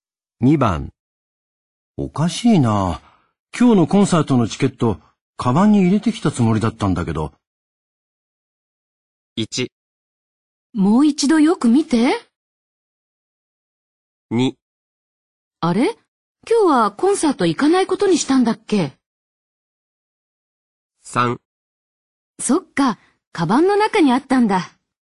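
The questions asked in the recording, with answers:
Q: おかしいな。今日のコンサートのチケット、カバンに入れてきたつもりだったんだけど。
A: 1: もう一度よく見て。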